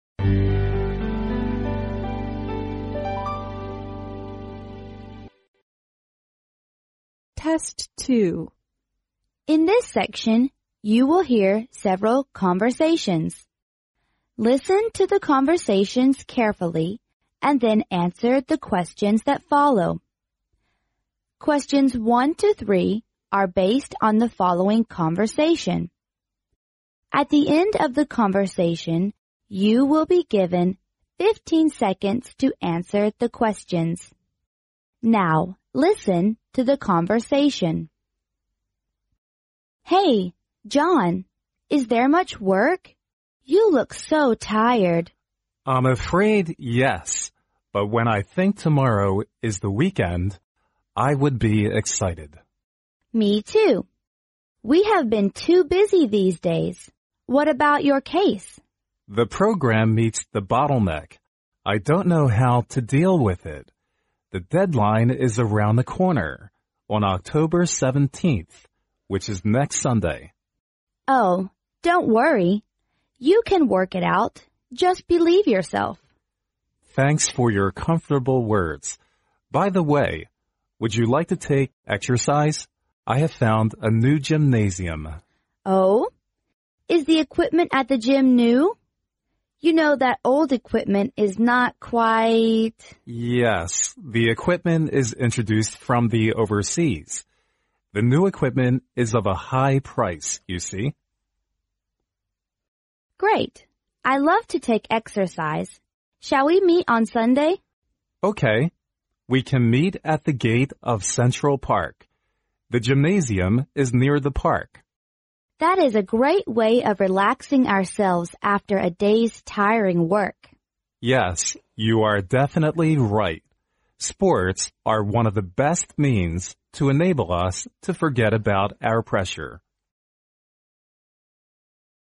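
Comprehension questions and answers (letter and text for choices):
Now,listen to the conversation.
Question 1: Why is the man excited at the beginning of the conversation?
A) He has done all his work.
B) He can relax at the weekend.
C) He will take some exercise.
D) He is glad to see the woman.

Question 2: Which of the following statements is INCORRECT?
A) The man and the woman are very busy.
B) The man and the woman like sports.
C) The man and the woman prefer old equipment in the gym.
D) The man and the woman are free on Sunday.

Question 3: The man and woman plan to_____.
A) meet next Sunday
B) work out the bottleneck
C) relax themselves at the park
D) go to a new gymnasium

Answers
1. B) He can relax at the weekend.
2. C) The man and the woman prefer old equipment in the gym.
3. D) go to a new gymnasium

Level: 英语四级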